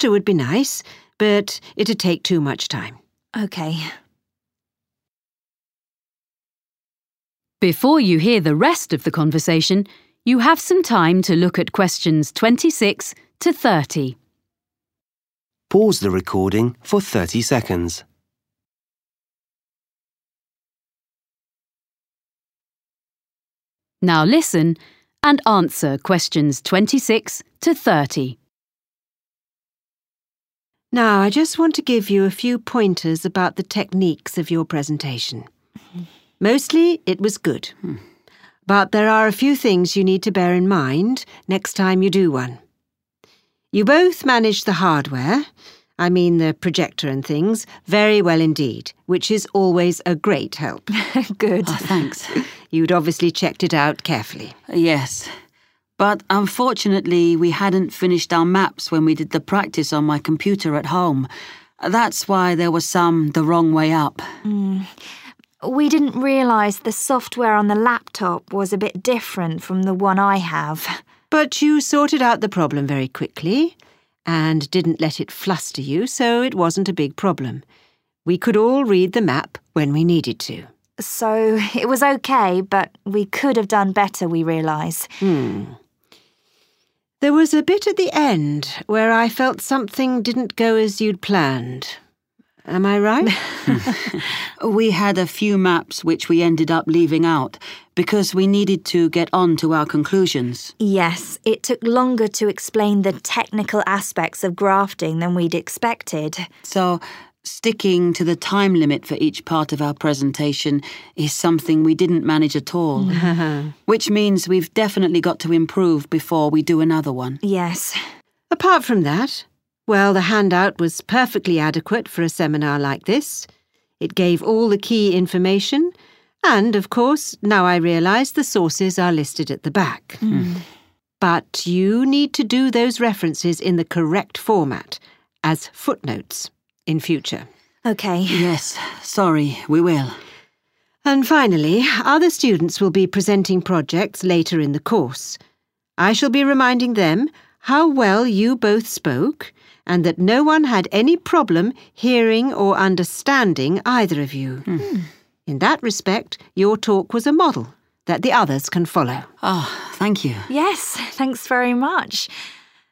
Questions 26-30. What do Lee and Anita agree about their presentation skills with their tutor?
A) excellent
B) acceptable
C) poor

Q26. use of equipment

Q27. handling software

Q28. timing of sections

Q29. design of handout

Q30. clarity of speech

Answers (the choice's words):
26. excellent
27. acceptable
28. poor
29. acceptable
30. excellent

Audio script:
Tutor: Now I just want to give you a few pointers about the techniques of your presentation. Mostly it was good, but there are a few things you need to bear in mind next time you do one. (Q26) You both managed the hardware (= use of equipment) I mean the projector and things, very well indeed, which is always a great help.
Anita: Good.
Lee: Thanks.
Tutor: You'd obviously checked it out carefully.
Lee: Yes. But unfortunately we hadn't finished our maps when we did the practice on my computer at home, that's why there were some the wrong way up.
Anita: We didn't realise the software on the laptop was a bit different from the one I have.
Tutor: But you sorted out the problem very quickly and didn't let it fluster you, so it wasn't a big problem. We could all read the map when we needed to.
Anita: (Q27) So it was OK. But we could have done better (Nó vẫn ổn.
Tutor: Mm. There was a bit at the end where I felt something didn't go as you'd planned – am I right?
Lee: We had a few maps which we ended up leaving out, because we needed to get on to our conclusions.
Anita: Yes, it took longer to explain the technical aspects of grafting than we'd expected.
Lee: (Q28) So sticking to the time limit for each part of our presentation (= timing of sections) is something we didn't manage at all.
Anita: Yes.
Tutor: Apart from that, well, (Q29) the handout was perfectly adequate for a seminar like this, it gave all the key information, and, of course, now I realise the sources are listed at the back. But you need to do those references in the correct format, as footnotes, in future.
Anita: OK.
Lee: Yes, sorry, we will.
Tutor: And finally, other students will be presenting projects later in the course. I shall be reminding them (Q30) how well you both spoke and that no one had any problem hearing or understanding (= clarity of speech) either of you. In that respect your talk was a model that the others can follow.